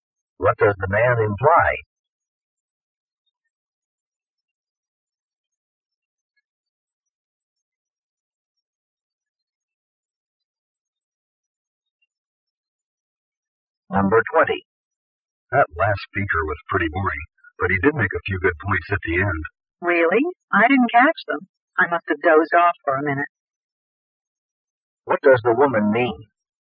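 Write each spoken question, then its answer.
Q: What does the woman mean?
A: She fell asleep and missed the speaker's good points.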